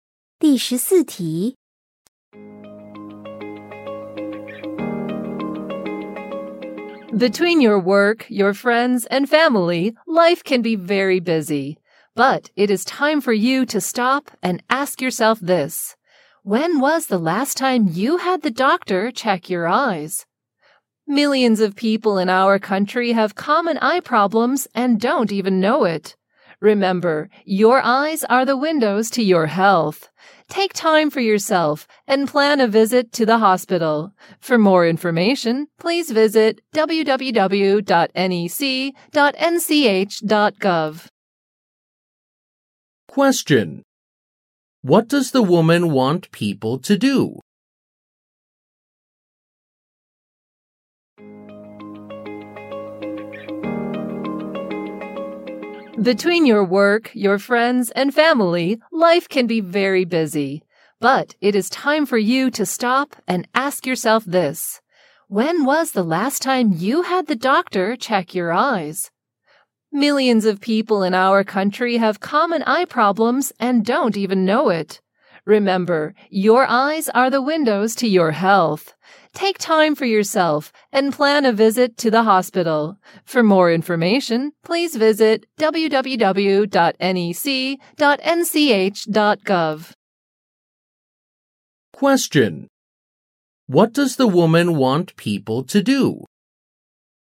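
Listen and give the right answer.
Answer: Visit the hospital to have their eyes checked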